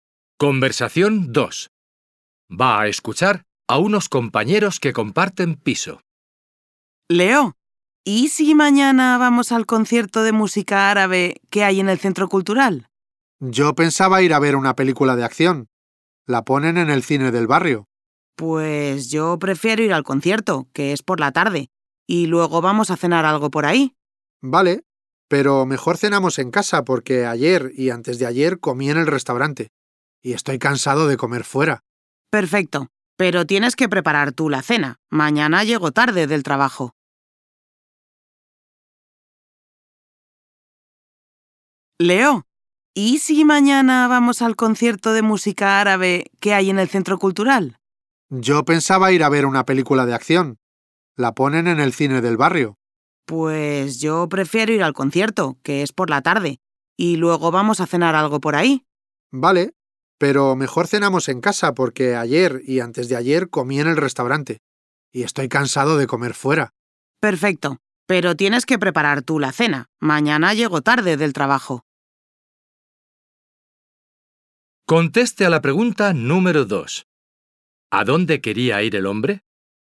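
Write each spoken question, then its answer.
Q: ¿A dónde quería ir el hombre?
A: Al cine del barrio, a ver una película de acción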